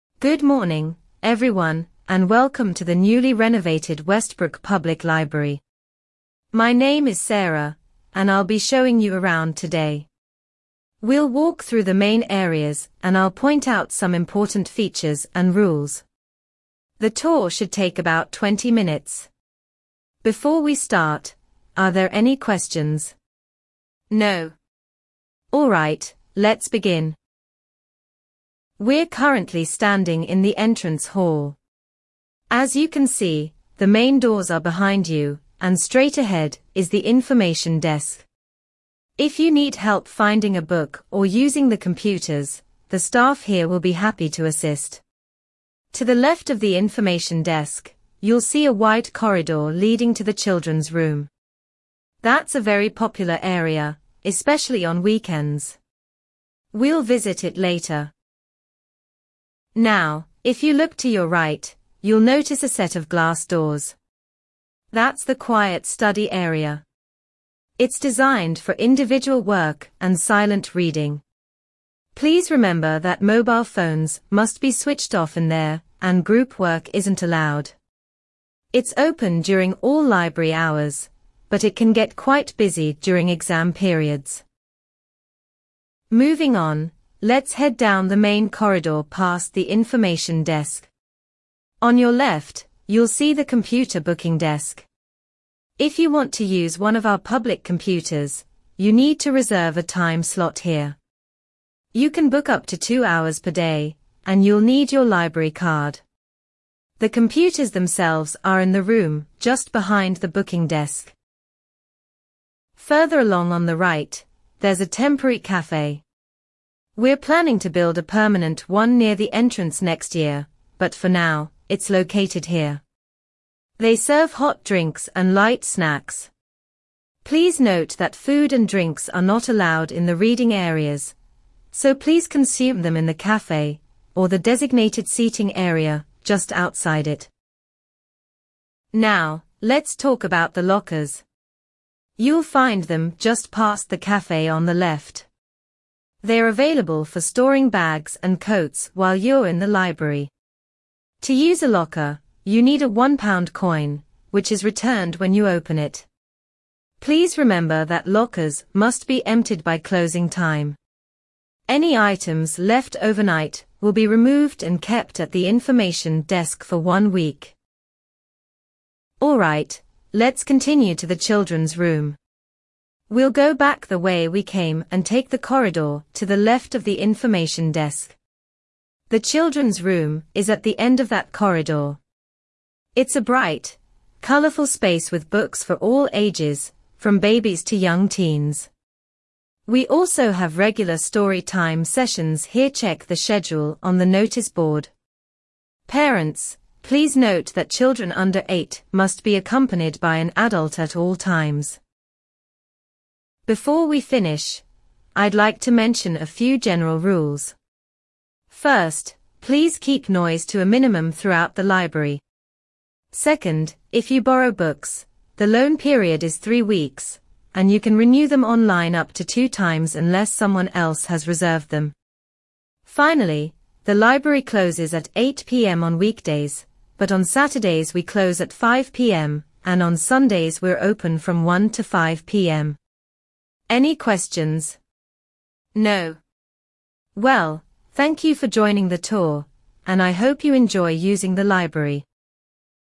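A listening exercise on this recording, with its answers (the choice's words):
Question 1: Where is the information desk located?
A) To the left of the entrance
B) Straight ahead from the entrance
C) To the right of the entrance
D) Behind the entrance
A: Straight ahead from the entrance

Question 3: What is the maximum daily computer booking per person?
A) One hour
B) Two hours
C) Three hours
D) Four hours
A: Two hours

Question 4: Where is the temporary cafe situated?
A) Near the entrance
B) Next to the children's room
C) Further along on the right past the computer booking desk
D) Inside the quiet study area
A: Further along on the right past the computer booking desk

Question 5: What is required to use a locker?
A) A library card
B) A one-pound coin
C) A reservation slip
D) A membership number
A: A one-pound coin

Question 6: What happens to items left in lockers overnight?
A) They are thrown away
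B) They are kept at the information desk for one week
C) They are donated to charity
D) They are returned to the owner's home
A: They are kept at the information desk for one week

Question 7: Where is the children's room located?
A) To the right of the entrance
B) Straight ahead from the entrance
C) At the end of the corridor to the left of the information desk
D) Next to the quiet study area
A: At the end of the corridor to the left of the information desk

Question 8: What is the rule for children under eight?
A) They must be accompanied by an adult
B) They can only visit on weekends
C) They must stay in the children's room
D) They are not allowed in the library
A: They must be accompanied by an adult

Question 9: How many times can a book be renewed if no one has reserved it?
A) Once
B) Twice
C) Three times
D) Unlimited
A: Twice

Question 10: What are the library's Sunday opening hours?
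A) 1 p.m. to 5 p.m.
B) 9 a.m. to 1 p.m.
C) 1 p.m. to 8 p.m.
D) Closed all day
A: 1 p.m. to 5 p.m.

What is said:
Good morning, everyone, and welcome to the newly renovated Westbrook Public Library. My name is Sarah, and I'll be showing you around today. We'll walk through the main areas and I'll point out some important features and rules. The tour should take about 20 minutes. Before we start, are there any questions? No? Alright, let's begin.
We're currently standing in the entrance hall. As you can see, the main doors are behind you, and straight ahead is the information desk. If you need help finding a book or using the computers, the staff here will be happy to assist. To the left of the information desk, you'll see a wide corridor leading to the children's room. That's a very popular area, especially on weekends. We'll visit it later.
Now, if you look to your right, you'll notice a set of glass doors. 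That's the quiet study area. It's designed for individual work and silent reading. Please remember that mobile phones must be switched off in there, and group work isn't allowed. It's open during all library hours, but it can get quite busy during exam periods.
Moving on, let's head down the main corridor past the information desk. On your left, you'll see the computer booking desk. If you want to use one of our public computers, you need to reserve a time slot here. You can book up to two hours per day, and you'll need your library card. The computers themselves are in the room just behind the booking desk.
Further along on the right, there's a temporary cafe. We're planning to build a permanent one near the entrance next year, but for now, it's located here. They serve hot drinks and light snacks. Please note that food and drinks are not allowed in the reading areas, so please consume them in the cafe or the designated seating area just outside it.
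Now, let's talk about the lockers. You'll find them just past the cafe on the left. They're available for storing bags and coats while you're in the library. To use a locker, you need a one-pound coin, which is returned when you open it. Please remember that lockers must be emptied by closing time. Any items left overnight will be removed and kept at the information desk for one week.
We'll go back the way we came and take the corridor to the left of the information desk. The children's room is at the end of that corridor. It's a bright, colourful space with books for all ages, from babies to young teens. We also have regular story time sessions here-check the schedule on the notice board. Parents, please note that children under eight must be accompanied by an adult at all times.
Before we finish, I'd like to mention a few general rules. First, please keep noise to a minimum throughout the library. 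Second, if you borrow books, the loan period is three weeks, and you can renew them online up to two times unless someone else has reserved them. Finally, the library closes at 8 p.m. on weekdays, but on Saturdays we close at 5 p.m., and on Sundays we're open from 1 to 5 p.m. Any questions? No? Well, thank you for joining the tour, and I hope you enjoy using the library.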